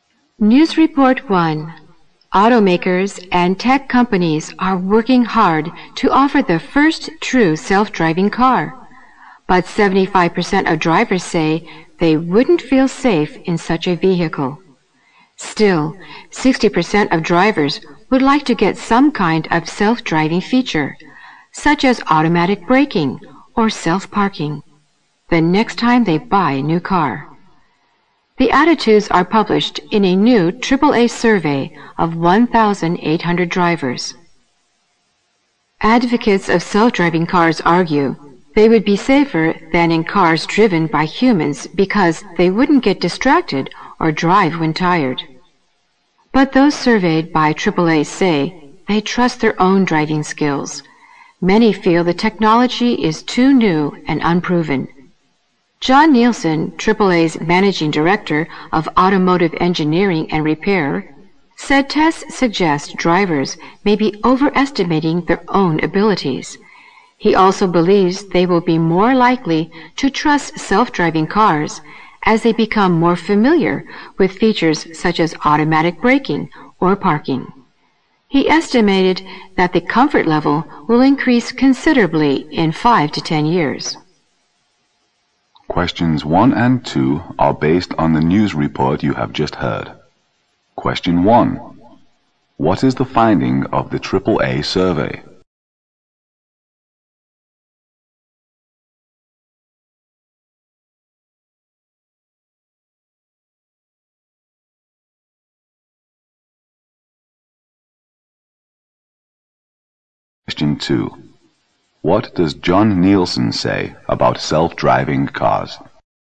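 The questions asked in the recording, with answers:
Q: What is the finding of the AAA survey?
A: Most drivers (75%) wouldn't feel safe in a self-driving car

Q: What does John Nielsen say about self-driving cars?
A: Drivers will trust them more as they become familiar with features like automatic braking or parking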